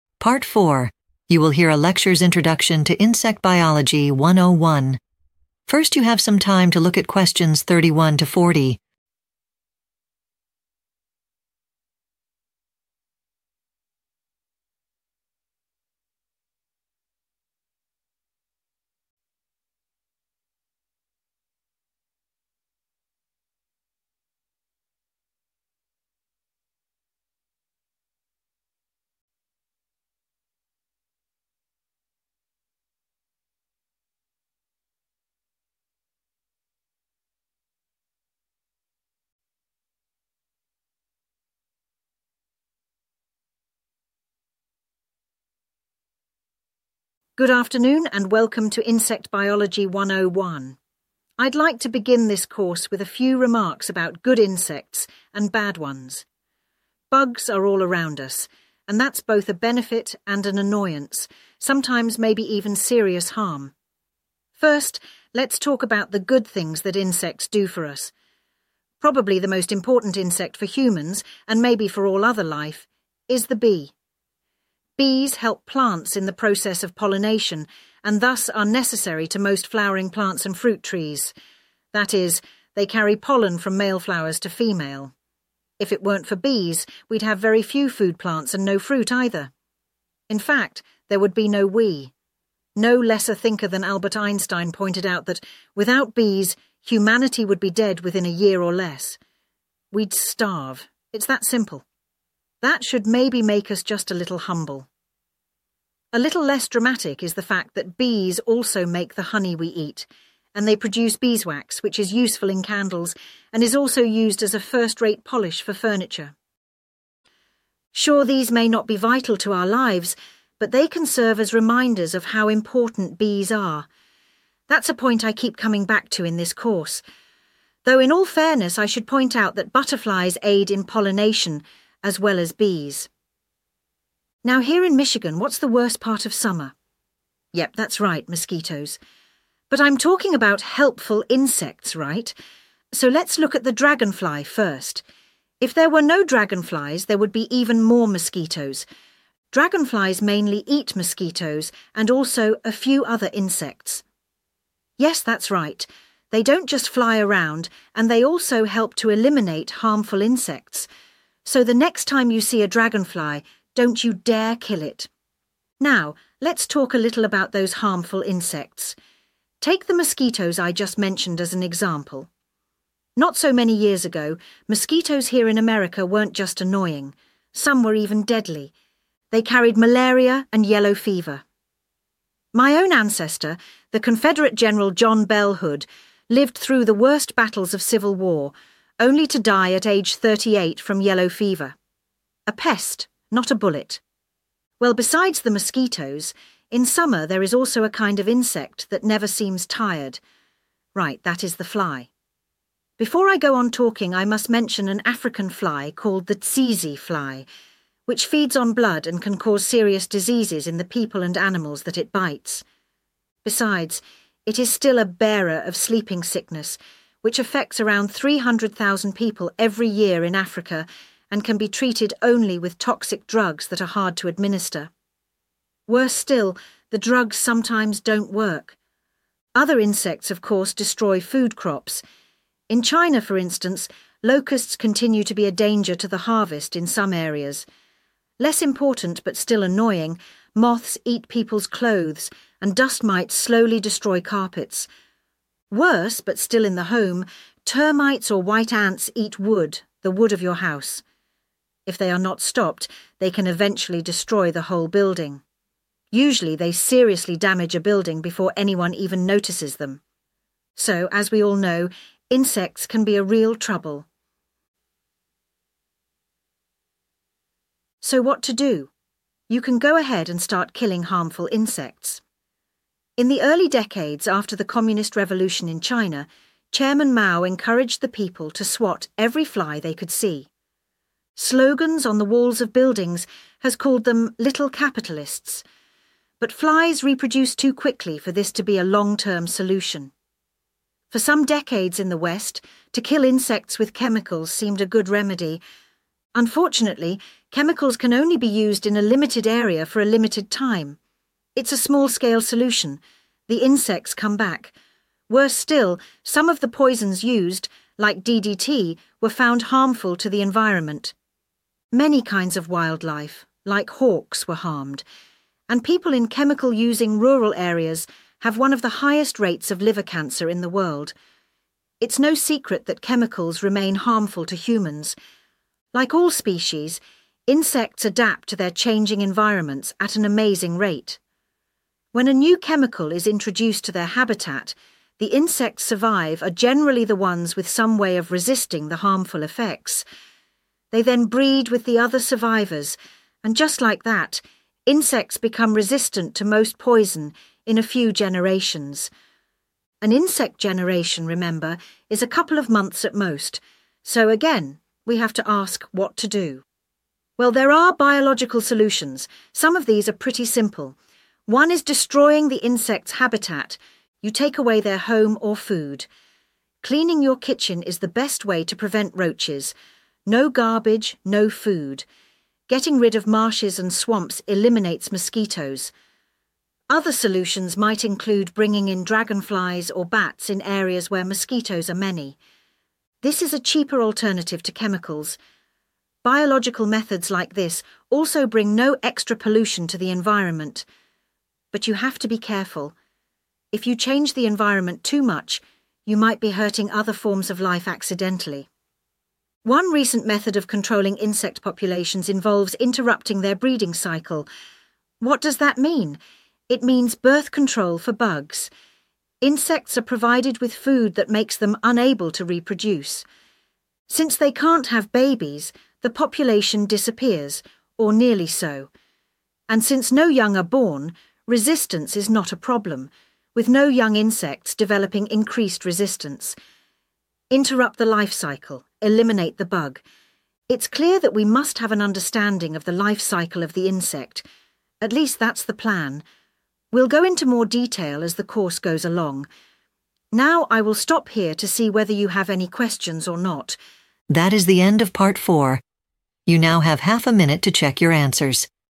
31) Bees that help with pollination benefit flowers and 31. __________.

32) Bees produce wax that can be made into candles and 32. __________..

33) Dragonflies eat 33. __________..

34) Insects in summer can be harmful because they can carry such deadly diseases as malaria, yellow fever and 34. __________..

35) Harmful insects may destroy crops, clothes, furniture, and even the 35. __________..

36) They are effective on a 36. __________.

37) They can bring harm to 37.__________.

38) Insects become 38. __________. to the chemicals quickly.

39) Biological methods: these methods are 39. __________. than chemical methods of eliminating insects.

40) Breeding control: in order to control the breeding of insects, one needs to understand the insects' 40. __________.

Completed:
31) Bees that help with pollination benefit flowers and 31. fruit trees.
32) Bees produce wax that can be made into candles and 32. polish..
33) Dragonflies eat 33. mosquitoes..
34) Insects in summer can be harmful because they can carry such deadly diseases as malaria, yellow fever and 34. sleeping sickness..
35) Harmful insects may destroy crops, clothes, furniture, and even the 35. whole building..
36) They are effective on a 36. small scale.
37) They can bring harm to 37.wildlife.
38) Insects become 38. resistant. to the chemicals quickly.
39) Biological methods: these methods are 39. cheaper. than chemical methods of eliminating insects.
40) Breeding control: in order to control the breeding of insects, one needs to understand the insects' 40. life cycle.